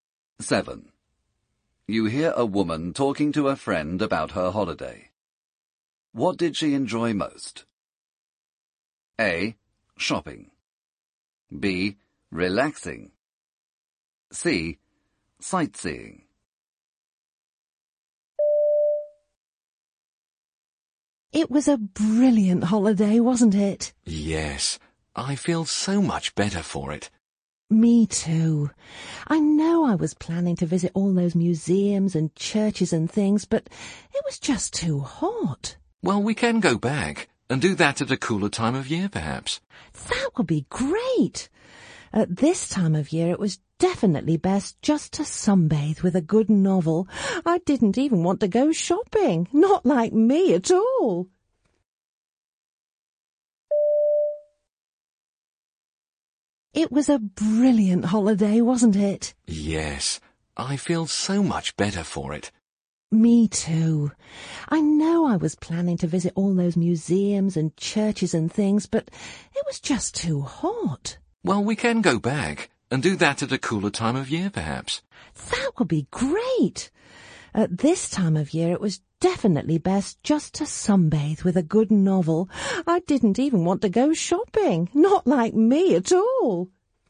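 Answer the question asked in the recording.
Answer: B: Relaxing.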